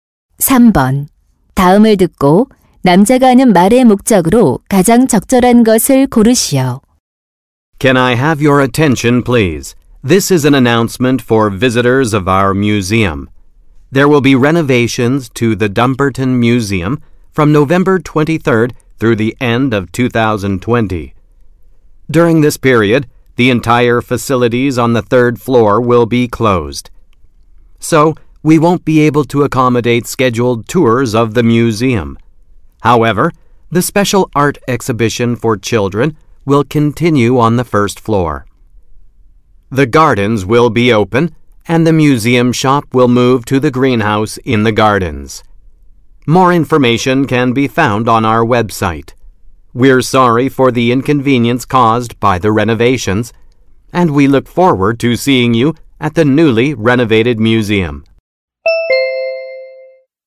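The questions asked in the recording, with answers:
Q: 다음을 듣고 남자가 하는 말의 목적으로 가장 적절한 것을 고르시오.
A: 박물관 보수 공사로 인한 시설 폐쇄 및 변경 사항을 안내하려고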